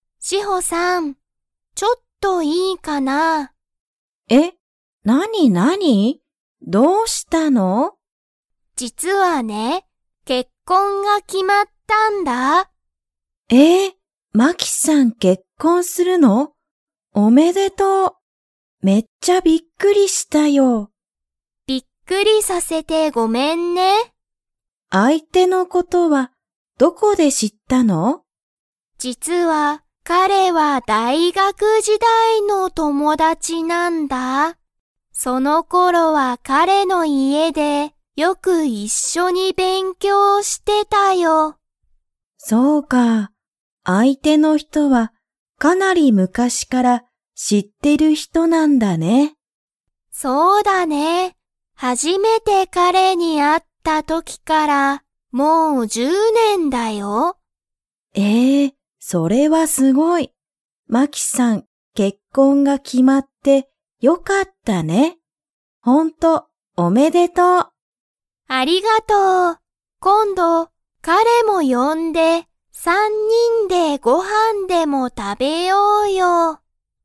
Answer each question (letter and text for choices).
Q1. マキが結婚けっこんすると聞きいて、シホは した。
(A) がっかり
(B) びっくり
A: (B) びっくり

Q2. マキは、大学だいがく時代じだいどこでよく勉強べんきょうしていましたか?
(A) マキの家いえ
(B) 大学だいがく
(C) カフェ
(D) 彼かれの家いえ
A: (D) 彼かれの家いえ

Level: Level 3